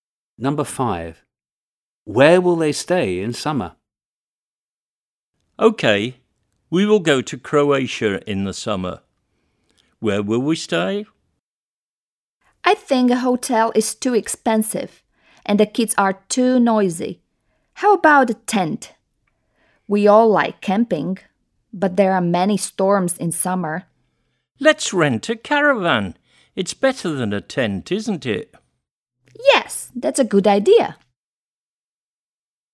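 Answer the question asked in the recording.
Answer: in a caravan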